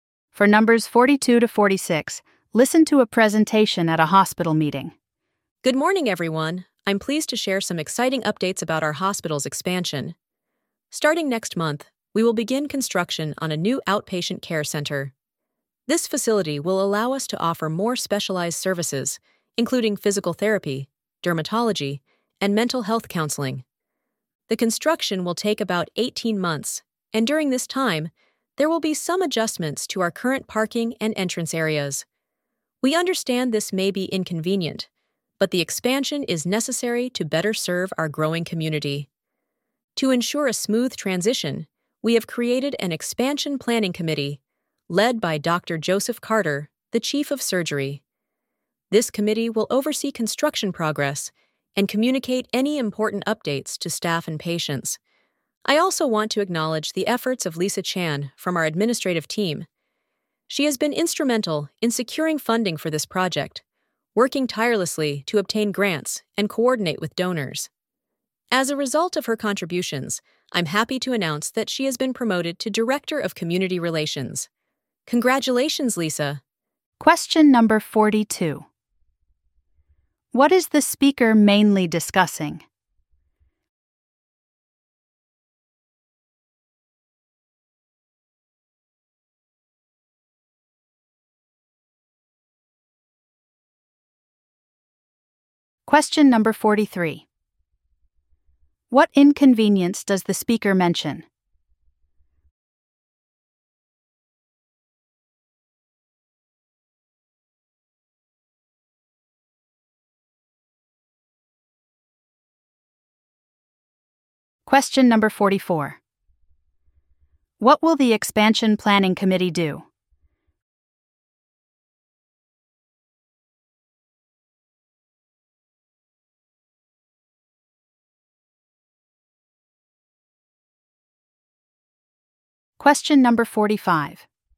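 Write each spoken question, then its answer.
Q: What is the speaker mainly discussing?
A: The hospital's expansion with a new outpatient care center

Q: What inconvenience does the speaker mention?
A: Changes to parking and entrance areas

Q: What will the expansion planning committee do?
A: Oversee construction and communicate updates

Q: Why was Lisa Chan promoted?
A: She secured funding for the project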